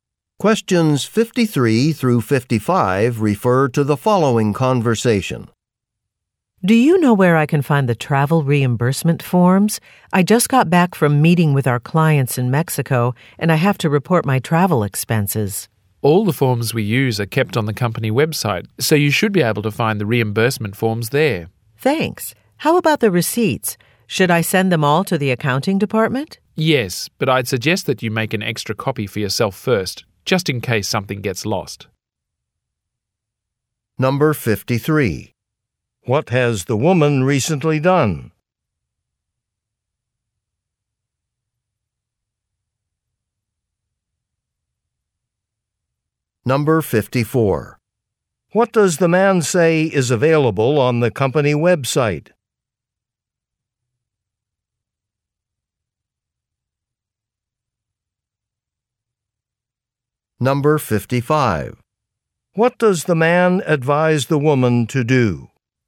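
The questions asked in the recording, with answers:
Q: What has the woman recently done?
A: Returned from a business trip to meet clients in Mexico

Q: What does the man say is available on the company website?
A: Company forms, including reimbursement forms

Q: What does the man advise the woman to do?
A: Make an extra copy of her receipts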